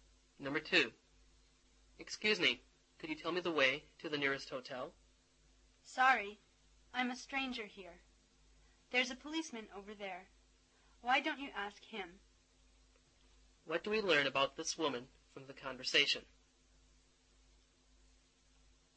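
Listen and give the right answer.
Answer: She is a stranger there and doesn't know the way.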